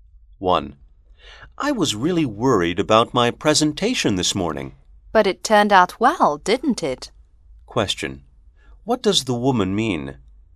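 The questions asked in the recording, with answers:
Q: What does the woman mean?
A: The presentation went well.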